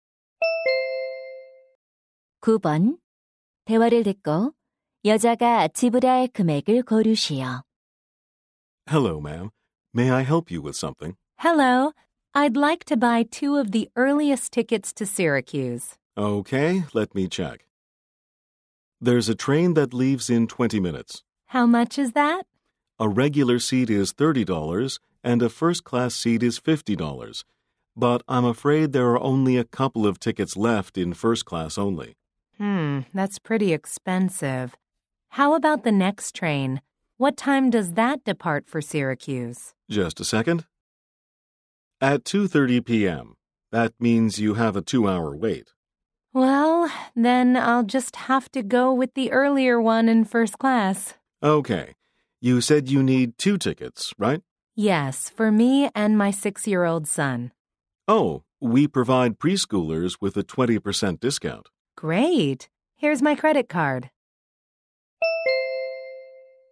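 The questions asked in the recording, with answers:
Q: 대화를 듣고 여자가 지불할 금액을 고르시오.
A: 90달러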